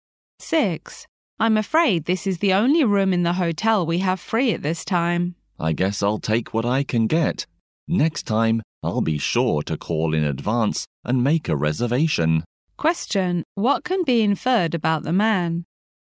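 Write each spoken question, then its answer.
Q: what can be inferred about the man?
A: He didn't book in advance and will take the room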